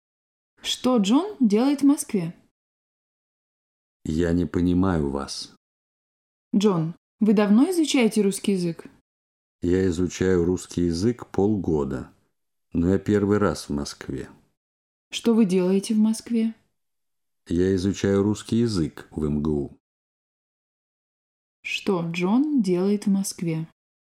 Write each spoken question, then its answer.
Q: Что Джон делает в Москве?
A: Джон изучает русский язык в МГУ.